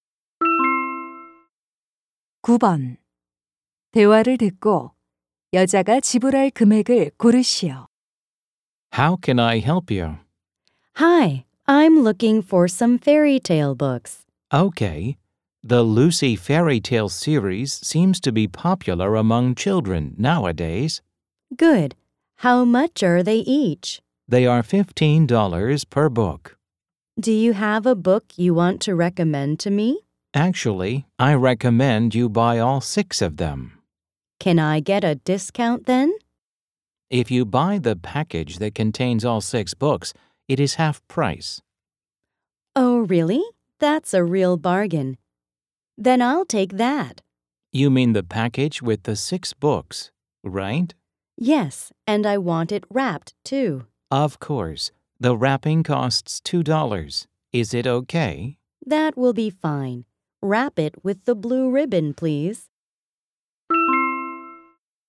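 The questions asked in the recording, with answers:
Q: 대화를 듣고 여자가 지불할 금액을 고르시오.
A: $47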